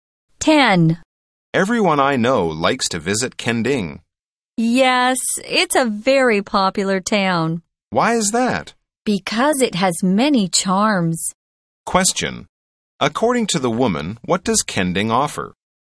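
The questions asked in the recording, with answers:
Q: According to the woman, what does Kending offer?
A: Many charms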